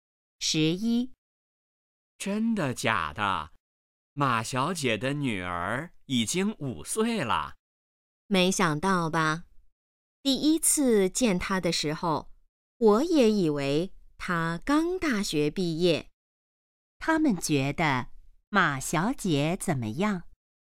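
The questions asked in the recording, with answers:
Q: 他们觉得马小姐怎么样?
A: 看起来很年轻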